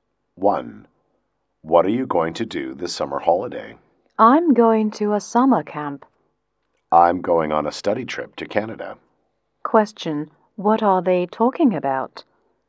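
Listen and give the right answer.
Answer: Their plans for the summer holiday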